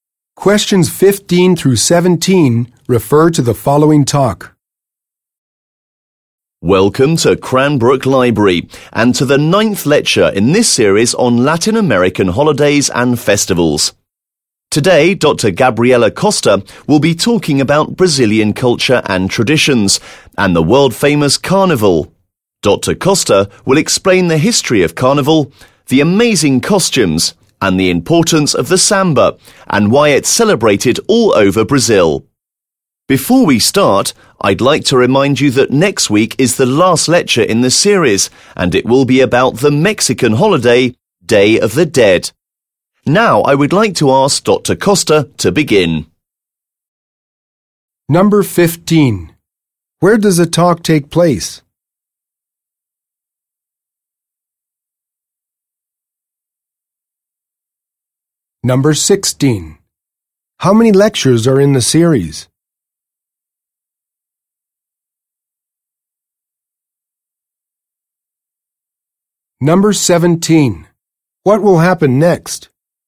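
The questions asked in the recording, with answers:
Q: Where does the talk take place?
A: At Cranbrook Library

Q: How many lectures are in the series?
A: Ten

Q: What will happen next?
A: Dr. Costa will begin her talk on Brazilian culture and carnival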